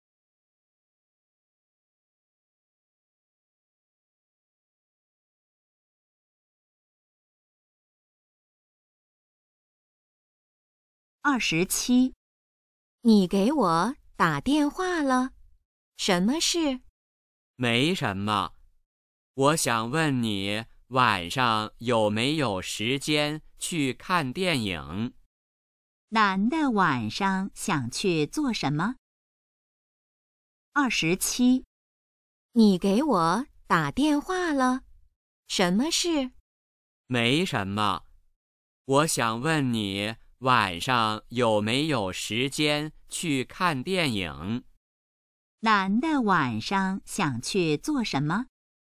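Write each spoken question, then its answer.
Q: 男的晚上想去做什么?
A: 看电影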